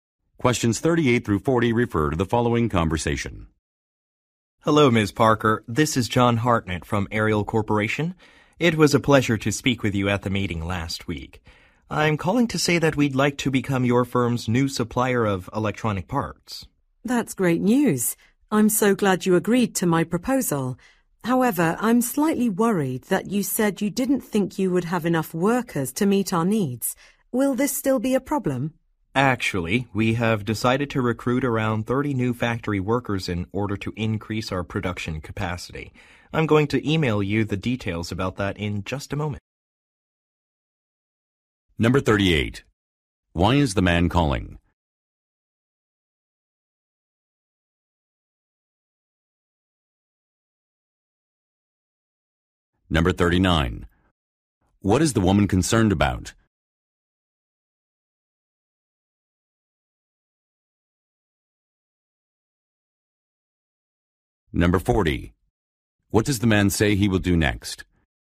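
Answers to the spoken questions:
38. To say his company wants to become her firm's new supplier of electronic parts
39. That the man's company won't have enough workers
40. Email her the details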